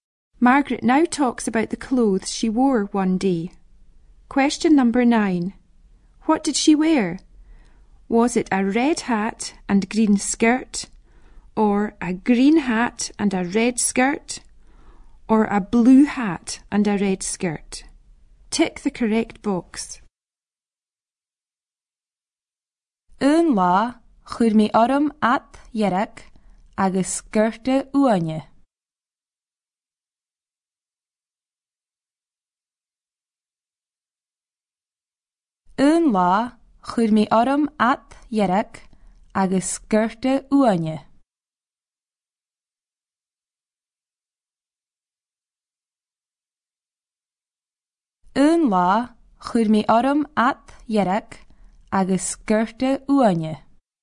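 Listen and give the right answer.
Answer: A: a red hat and green skirt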